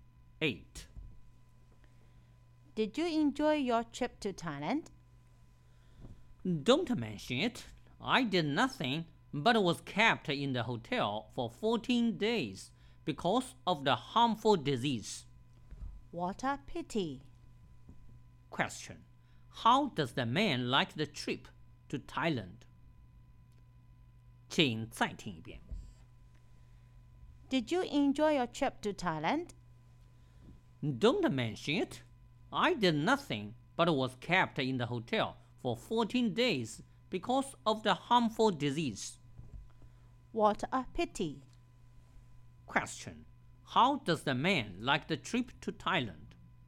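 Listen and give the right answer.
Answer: He didn't enjoy it; he was kept in the hotel for 14 days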